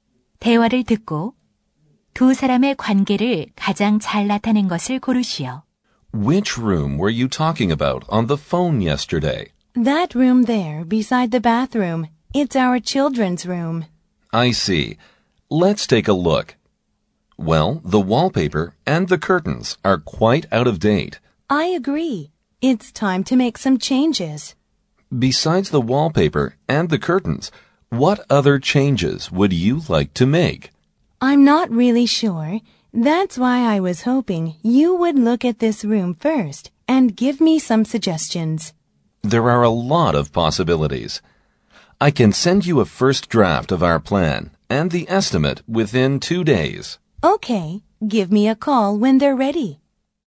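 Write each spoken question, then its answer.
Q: 8번 대화를 듣고 두 사람의 관계를 가장 잘 나타낸 것을 고르시오.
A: 고객 – 인테리어 디자이너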